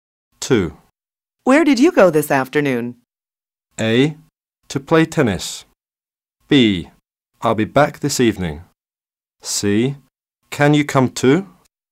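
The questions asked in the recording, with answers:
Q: Where did you go this afternoon?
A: A: To play tennis.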